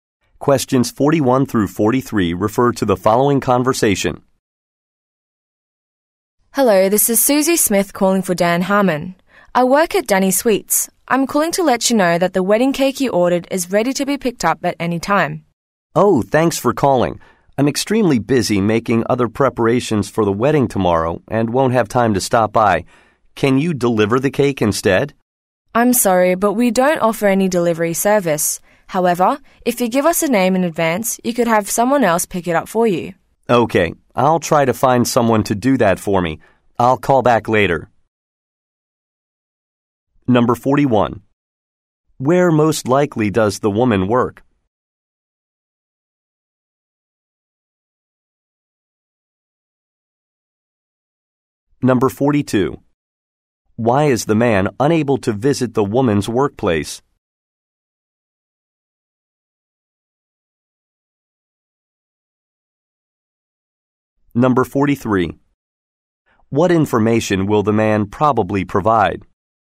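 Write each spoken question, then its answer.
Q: Where most likely does the woman work?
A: At a bakery

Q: Why is the man unable to visit the woman's workplace?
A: He is busy preparing for the wedding

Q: What information will the man probably provide?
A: The name of someone to pick up the cake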